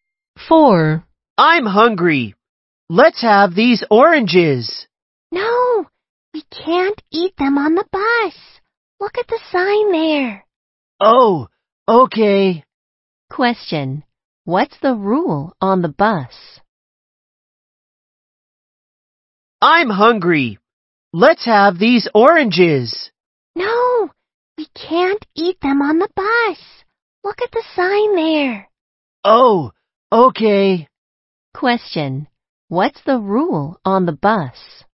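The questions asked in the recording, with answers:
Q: What's the rule on the bus?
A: No eating on the bus.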